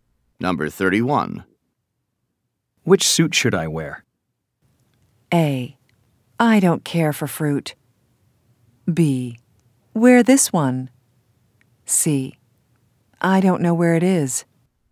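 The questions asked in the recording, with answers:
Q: Which suit should I wear?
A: B: Wear this one.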